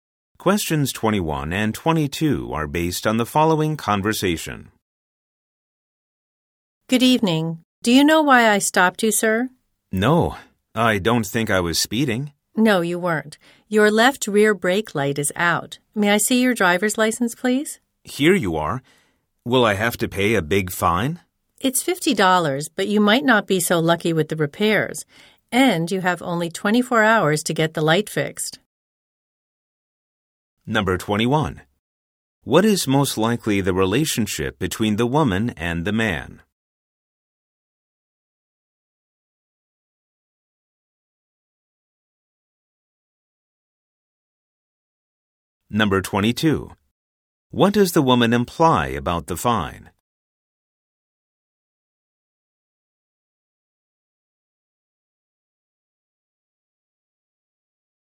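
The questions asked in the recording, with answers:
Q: What is most likely the relationship between the woman and the man?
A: Police officer and driver

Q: What does the woman imply about the fine?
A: The repairs may cost more than the fine.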